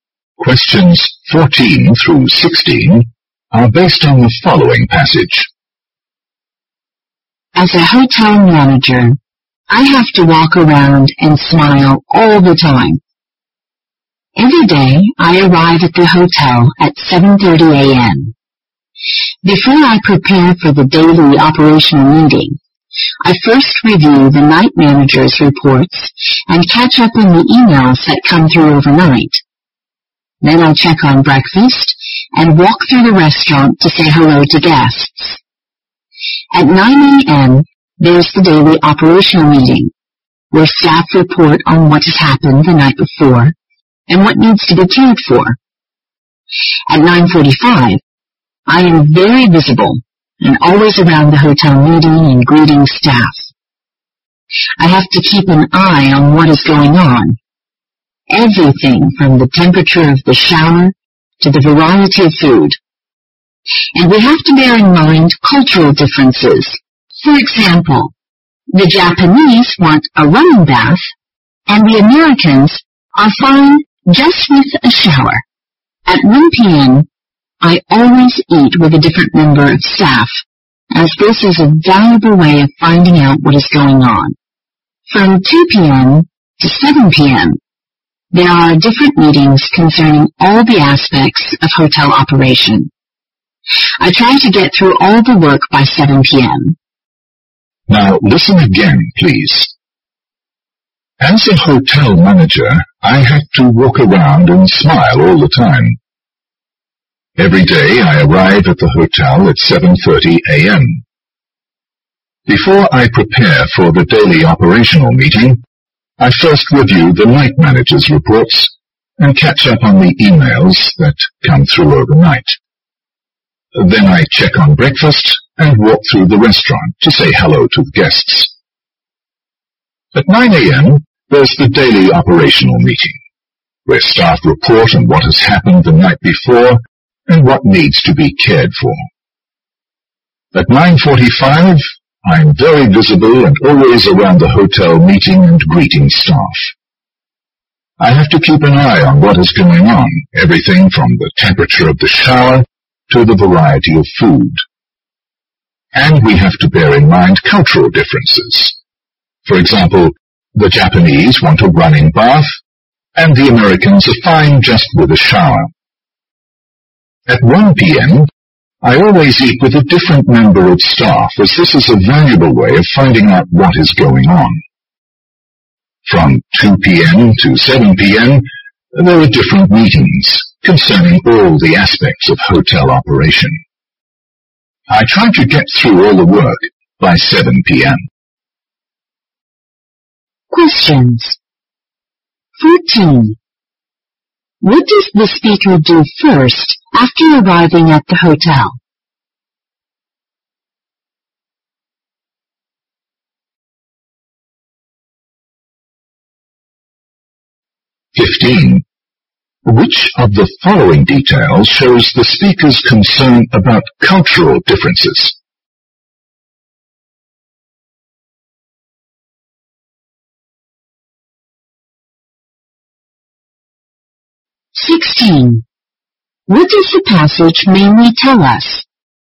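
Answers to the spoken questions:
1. Reviews the night manager's reports
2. The Japanese want a running bath, while Americans are fine with a shower
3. A hotel manager's daily routine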